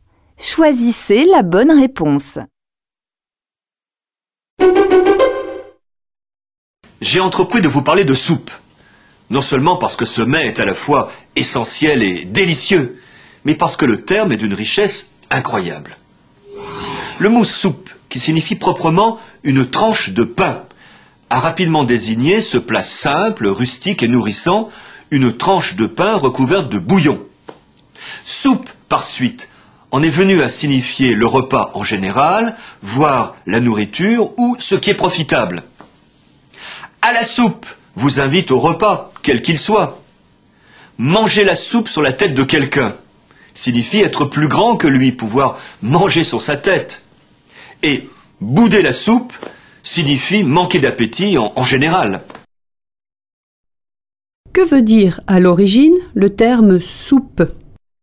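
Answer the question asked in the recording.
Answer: Une tranche de pain

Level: Tăng dần từ trình độ A1 đến C1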